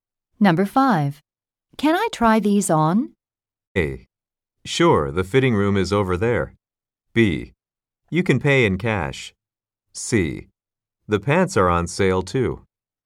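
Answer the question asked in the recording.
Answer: A: Sure, the fitting room is over there.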